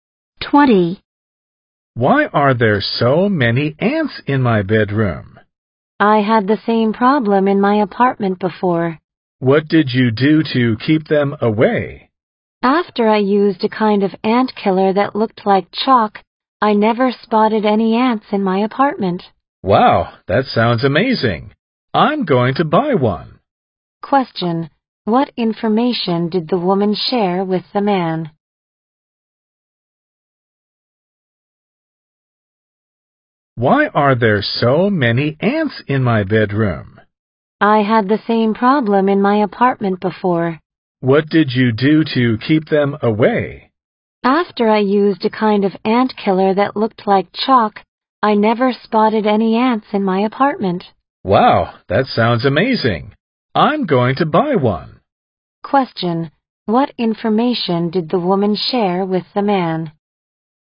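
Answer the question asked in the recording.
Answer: A chalk-like ant killer kept ants away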